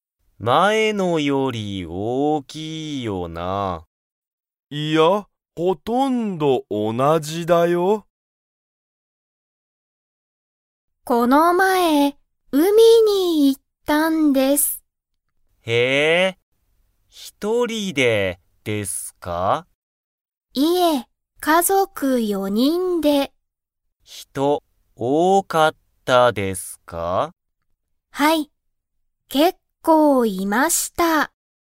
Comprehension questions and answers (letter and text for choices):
田中(たなか)さんは、一人(ひとり)で海(うみ)に行(い)きましたか?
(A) はい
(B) いいえ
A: (B) いいえ

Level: Level 1